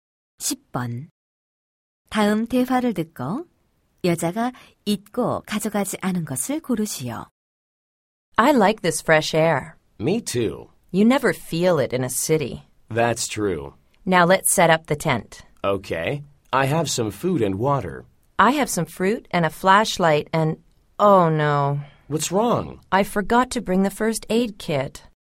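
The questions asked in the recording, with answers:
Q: 여자가 잊고 가져가지 않은 것을 고르지요.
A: 구급상자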